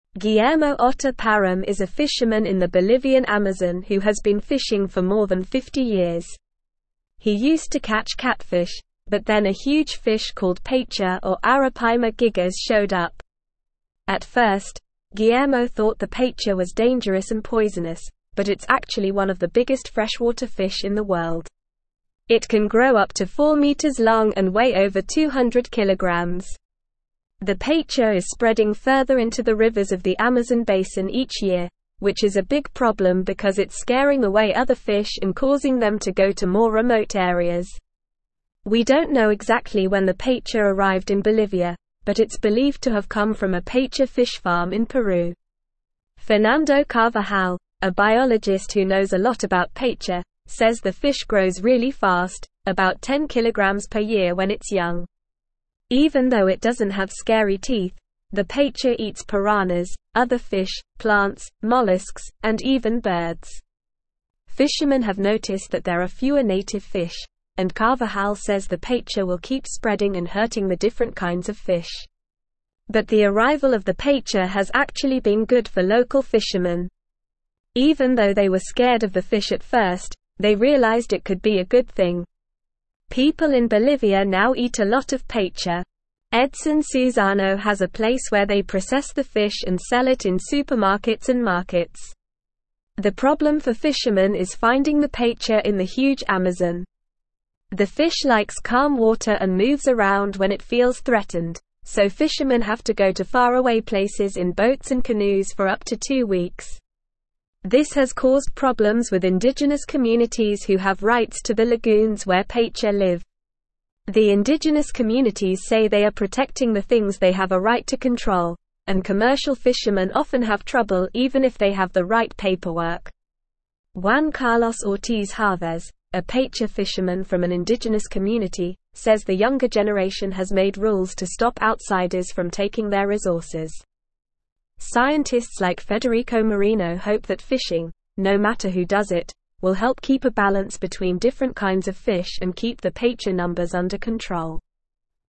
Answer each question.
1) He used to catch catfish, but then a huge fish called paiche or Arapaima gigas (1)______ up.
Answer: showed

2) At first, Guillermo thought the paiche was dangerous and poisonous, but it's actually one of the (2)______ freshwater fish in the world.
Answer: biggest

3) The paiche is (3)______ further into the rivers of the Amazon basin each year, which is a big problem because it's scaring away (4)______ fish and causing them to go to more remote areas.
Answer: spreading

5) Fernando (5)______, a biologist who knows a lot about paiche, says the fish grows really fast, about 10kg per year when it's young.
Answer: Carvajal

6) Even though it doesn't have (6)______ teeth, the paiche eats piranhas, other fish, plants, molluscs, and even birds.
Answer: scary

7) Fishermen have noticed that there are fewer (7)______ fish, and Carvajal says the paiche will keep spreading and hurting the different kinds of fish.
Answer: native

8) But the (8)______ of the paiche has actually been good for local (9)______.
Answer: arrival

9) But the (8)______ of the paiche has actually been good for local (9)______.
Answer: fishermen

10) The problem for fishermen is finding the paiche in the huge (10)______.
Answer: Amazon

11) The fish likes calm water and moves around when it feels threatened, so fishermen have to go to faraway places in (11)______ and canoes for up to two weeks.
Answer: boats

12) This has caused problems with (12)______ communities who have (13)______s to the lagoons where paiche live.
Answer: indigenous

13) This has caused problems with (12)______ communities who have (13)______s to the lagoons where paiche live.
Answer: right

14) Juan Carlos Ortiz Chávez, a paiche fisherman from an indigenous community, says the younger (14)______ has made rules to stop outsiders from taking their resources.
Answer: generation

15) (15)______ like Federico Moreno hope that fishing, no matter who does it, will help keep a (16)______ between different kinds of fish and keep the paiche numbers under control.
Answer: Scientists

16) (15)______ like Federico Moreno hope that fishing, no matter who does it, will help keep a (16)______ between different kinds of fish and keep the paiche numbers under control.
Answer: balance

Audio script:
Guillermo Otta Parum is a fisherman in the Bolivian Amazon who has been fishing for more than 50 years. He used to catch catfish, but then a huge fish called paiche or Arapaima gigas showed up. At first, Guillermo thought the paiche was dangerous and poisonous, but it's actually one of the biggest freshwater fish in the world. It can grow up to 4 meters long and weigh over 200kg. The paiche is spreading further into the rivers of the Amazon basin each year, which is a big problem because it's scaring away other fish and causing them to go to more remote areas.
We don't know exactly when the paiche arrived in Bolivia, but it's believed to have come from a paiche fish farm in Peru. Fernando Carvajal, a biologist who knows a lot about paiche, says the fish grows really fast, about 10kg per year when it's young. Even though it doesn't have scary teeth, the paiche eats piranhas, other fish, plants, molluscs, and even birds. Fishermen have noticed that there are fewer native fish, and Carvajal says the paiche will keep spreading and hurting the different kinds of fish.
But the arrival of the paiche has actually been good for local fishermen. Even though they were scared of the fish at first, they realized it could be a good thing. People in Bolivia now eat a lot of paiche. Edson Suzano has a place where they process the fish and sell it in supermarkets and markets. The problem for fishermen is finding the paiche in the huge Amazon. The fish likes calm water and moves around when it feels threatened, so fishermen have to go to faraway places in boats and canoes for up to two weeks. This has caused problems with indigenous communities who have rights to the lagoons where paiche live.
The indigenous communities say they are protecting the things they have a right to control, and commercial fishermen often have trouble even if they have the right paperwork. Juan Carlos Ortiz Chávez, a paiche fisherman from an indigenous community, says the younger generation has made rules to stop outsiders from taking their resources. Scientists like Federico Moreno hope that fishing, no matter who does it, will help keep a balance between different kinds of fish and keep the paiche numbers under control.

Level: Level 3